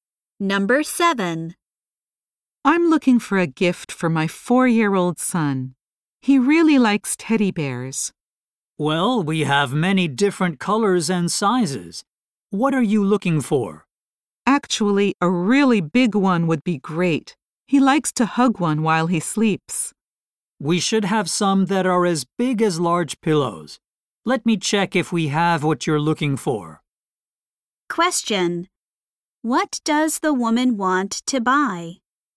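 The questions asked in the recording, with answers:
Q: What does the woman want to buy?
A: A big teddy bear for her son.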